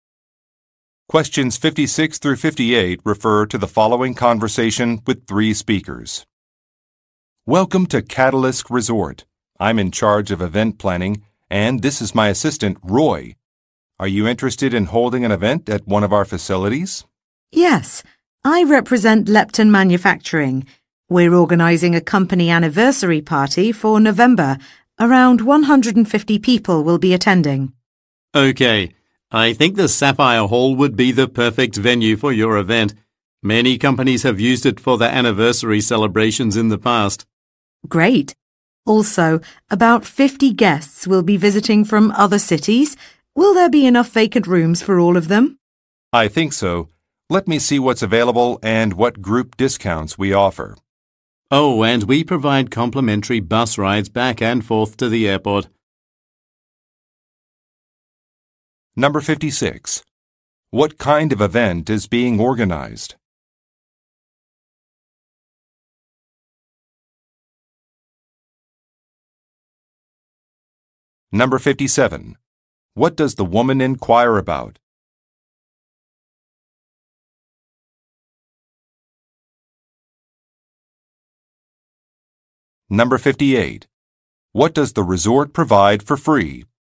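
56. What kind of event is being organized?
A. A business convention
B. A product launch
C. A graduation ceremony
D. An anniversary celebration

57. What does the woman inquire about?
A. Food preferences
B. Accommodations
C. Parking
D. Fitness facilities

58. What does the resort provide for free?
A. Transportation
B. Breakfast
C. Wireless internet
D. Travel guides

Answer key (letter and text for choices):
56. D. An anniversary celebration
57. B. Accommodations
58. A. Transportation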